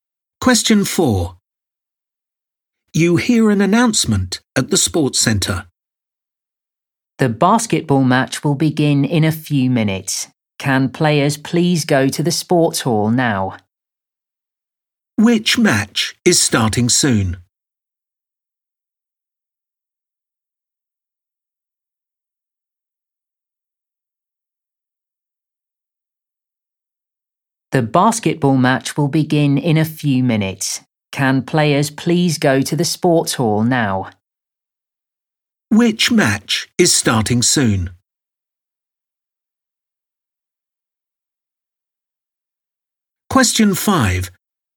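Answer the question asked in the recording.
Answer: the basketball match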